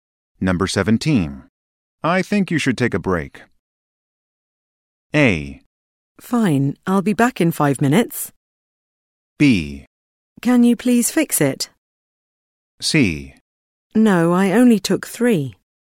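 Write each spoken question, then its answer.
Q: I think you should take a break.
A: A: Fine, I'll be back in 5 minutes.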